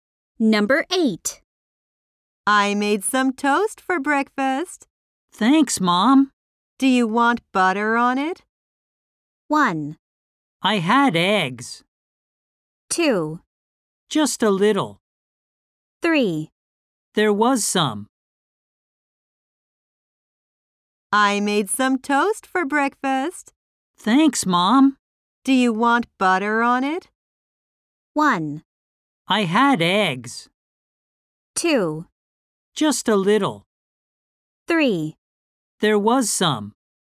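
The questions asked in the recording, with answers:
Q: Do you want butter on it?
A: 2: Just a little.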